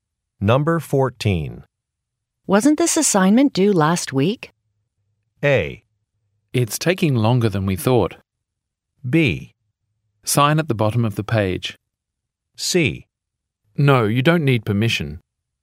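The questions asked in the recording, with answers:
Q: Wasn't this assignment due last week?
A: A: It's taking longer than we thought.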